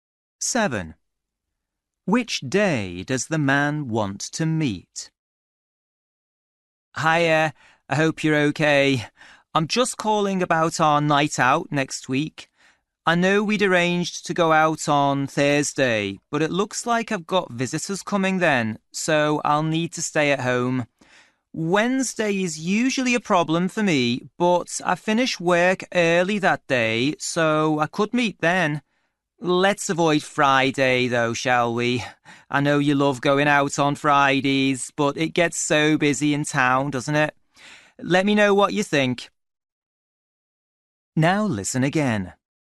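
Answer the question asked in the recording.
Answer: Wednesday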